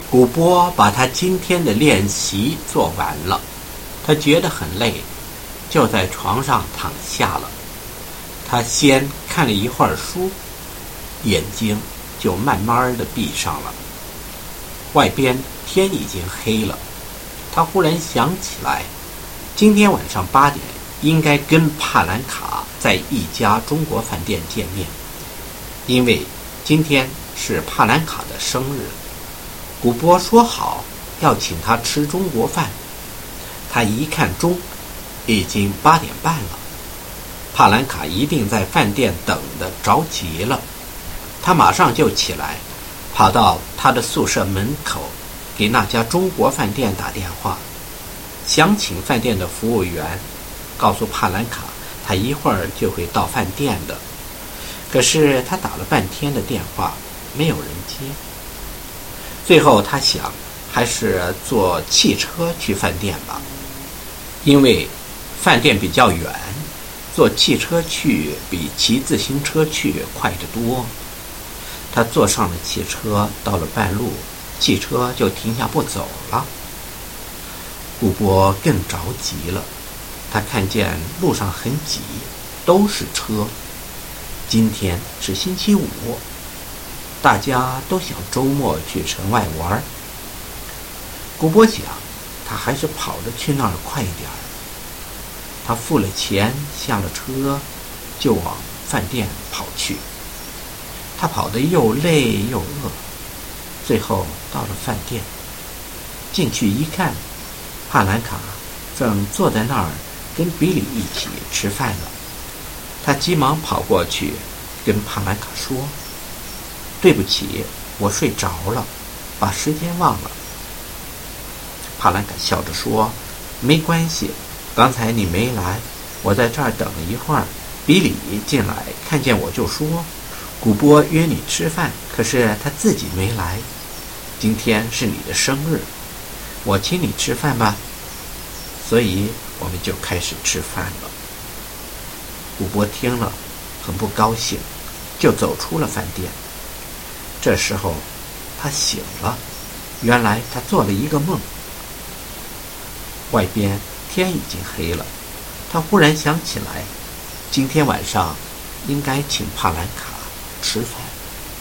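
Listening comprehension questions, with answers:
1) Why did Gobo feel tired?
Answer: He had finished doing today's exercises.

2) Did he go to sleep immediately?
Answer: No, he read a book for a while first, then his eyes slowly closed.

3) Why did he want to invite Palanka for a meal?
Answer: Because it was Palanka's birthday.

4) What time was he supposed to meet Palanka?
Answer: 8 o'clock in the evening

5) Why did he want to phone the Chinese restaurant?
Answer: To ask the waiter to tell Palanka he would arrive soon.

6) Why did he go there by a taxi?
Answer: The restaurant was far, and a car is much faster than a bicycle.

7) Describe the journey to the restaurant.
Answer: Halfway the car stopped because the road was crowded with Friday weekend traffic, so he paid, got out and ran to the restaurant, tired and hungry.

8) What was Palanka doing when Gubo arrived in the restaurant?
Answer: She was sitting there eating with Billy.

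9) What did Palanka say to Gubo?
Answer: It didn't matter; she waited, then Billy came and offered to treat her for her birthday, so they started eating.

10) Was Gubo supposed to invite Palanka for a meal that day?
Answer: Yes, that evening (it was all a dream).

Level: First year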